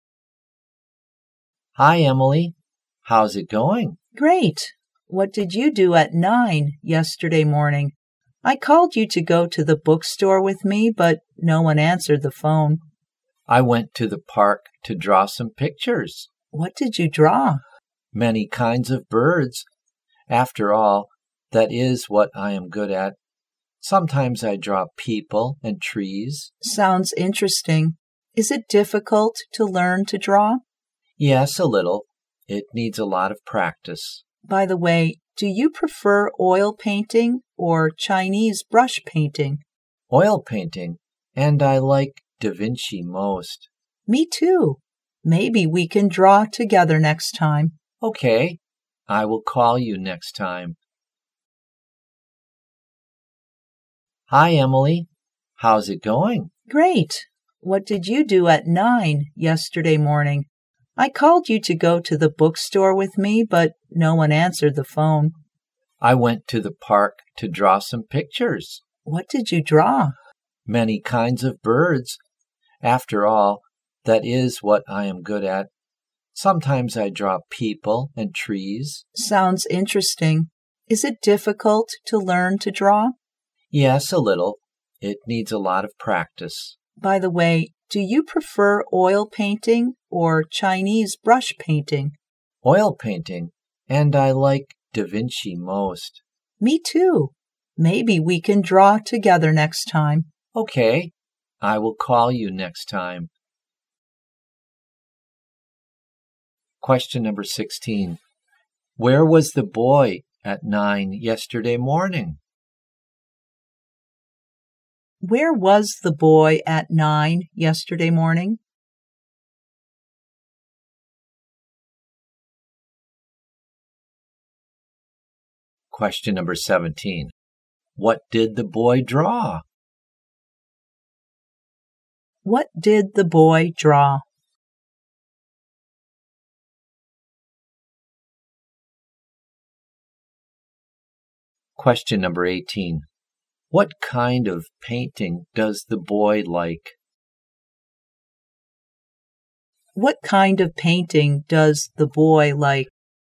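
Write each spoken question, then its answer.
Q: Where was the boy at 9 yesterday morning?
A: In the park

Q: What did the boy draw?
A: Birds

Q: What kind of painting does the boy like?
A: Oil painting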